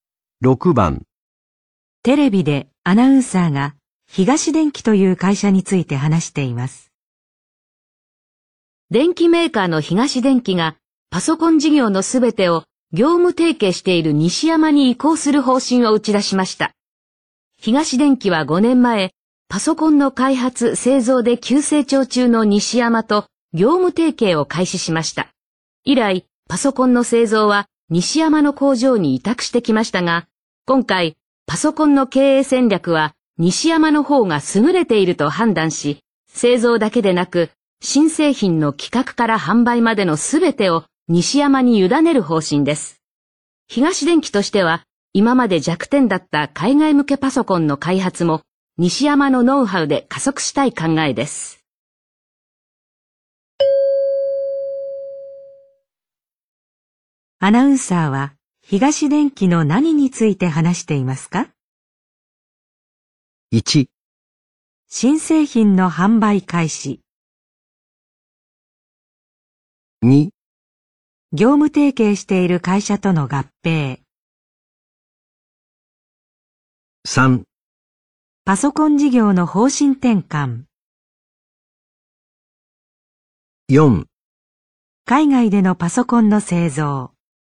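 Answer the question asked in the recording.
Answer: 3: パソコン事業の方針転換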